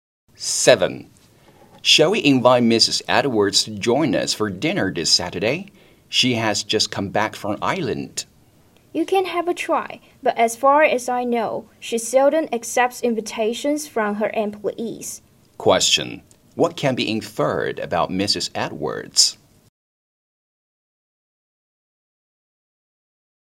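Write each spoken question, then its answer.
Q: What can be inferred about Mrs. Edwards?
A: She probably won't accept the invitation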